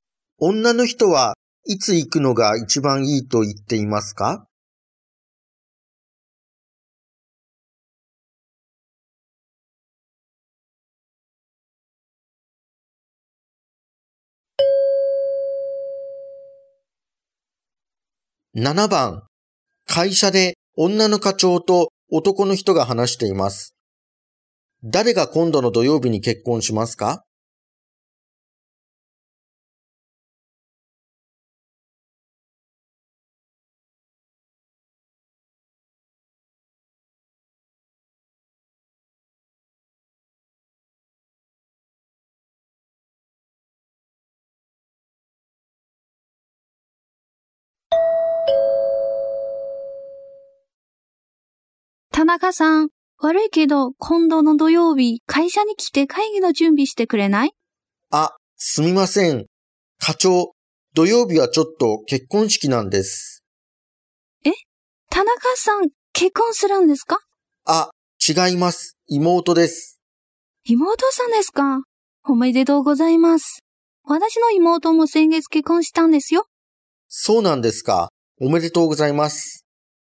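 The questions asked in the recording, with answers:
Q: 誰が今度の土曜日に結婚しますか?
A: 田中さんの妹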